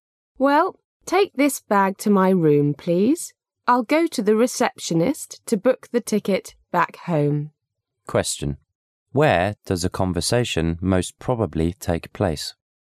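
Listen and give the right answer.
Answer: In a hotel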